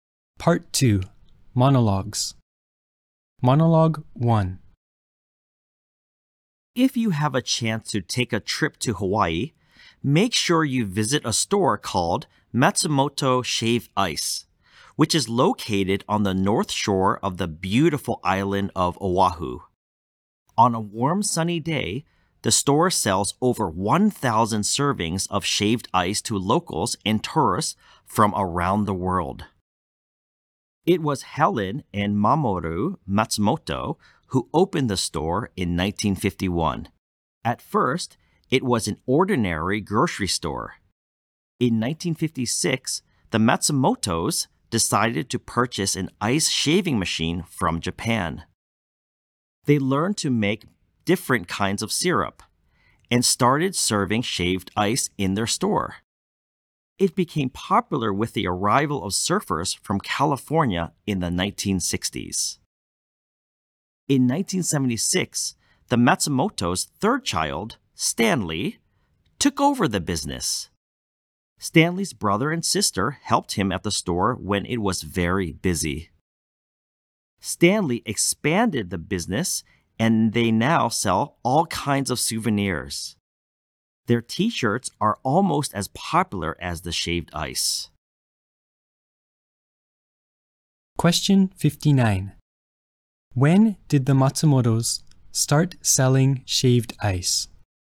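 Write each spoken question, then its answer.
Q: When did the Matsumotos start selling shaved ice?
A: In 1956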